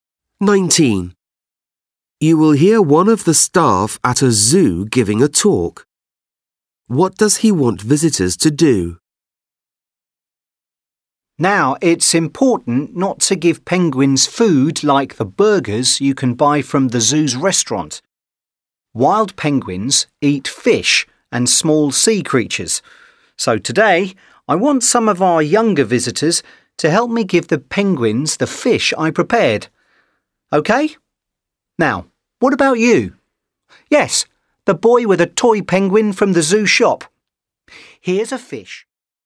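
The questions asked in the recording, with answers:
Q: What does he want visitors to do?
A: Help him give the penguins fish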